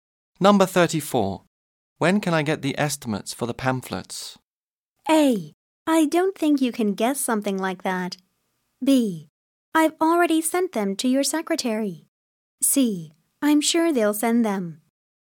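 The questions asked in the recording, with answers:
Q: When can I get the estimates for the pamphlets?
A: B: I've already sent them to your secretary.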